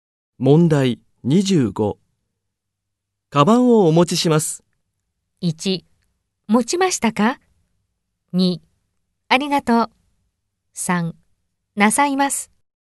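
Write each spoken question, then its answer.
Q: カバンをお持ちします。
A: 2: ありがとう。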